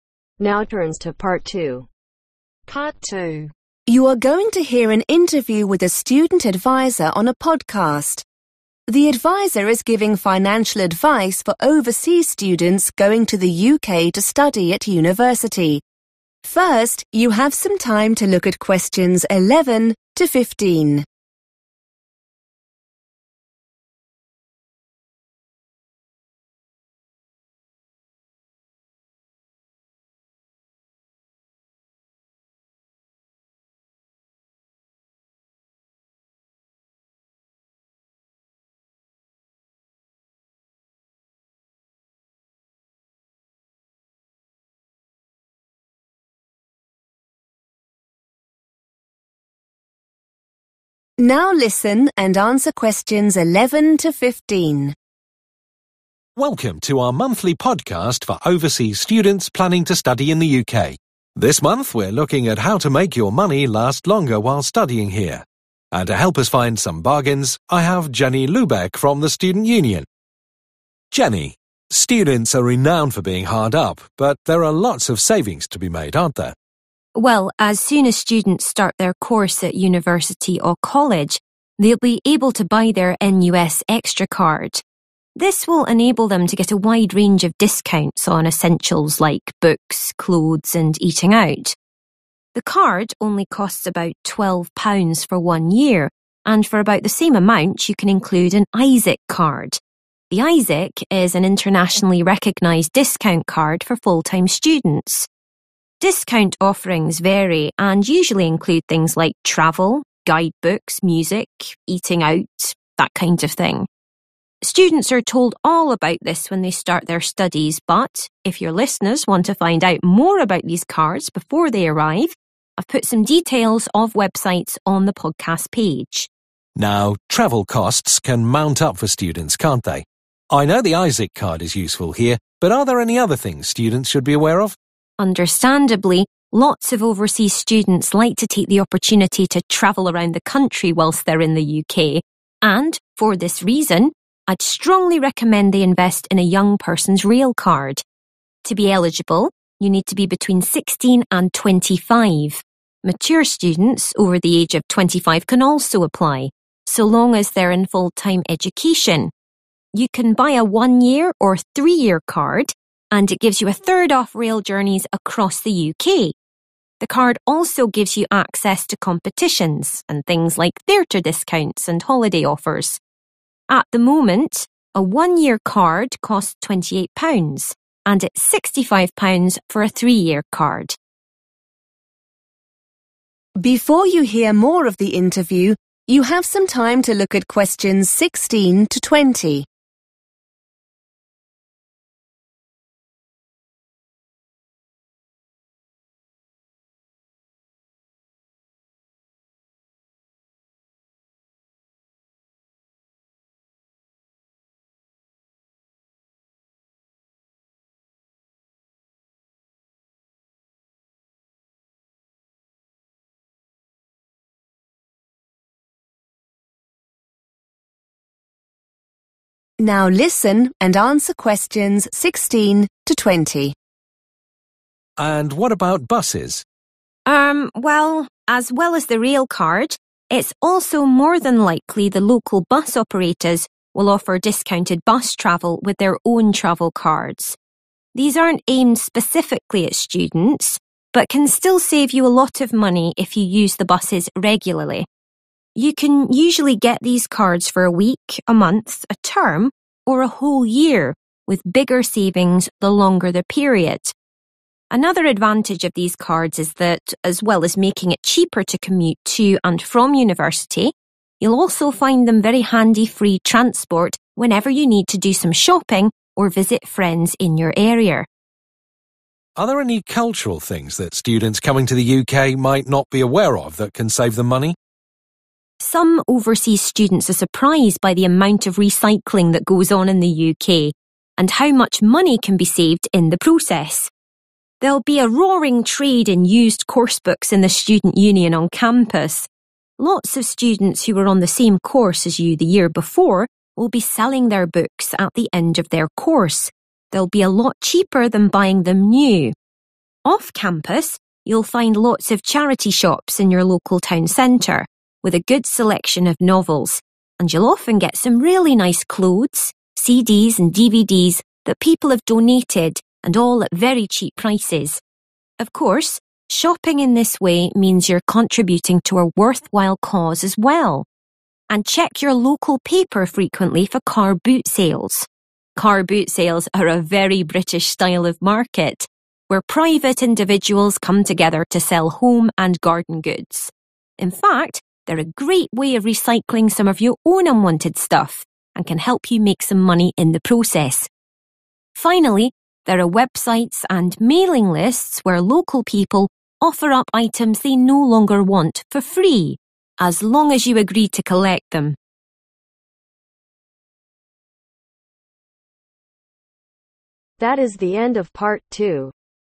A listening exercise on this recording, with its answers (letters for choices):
Choose the correct letter A , B or C.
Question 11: NUS extra cards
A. are offered free to all students.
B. are recognized internationality.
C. give you a year's worth of discounts.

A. Household items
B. Vintage clothes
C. Second-hand textbooks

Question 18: The university campus ............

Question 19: Charity shops ............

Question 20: Car boot sales ............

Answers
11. C
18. C
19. B
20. A